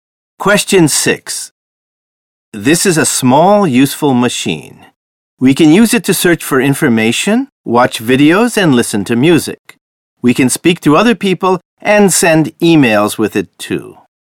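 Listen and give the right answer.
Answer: A smartphone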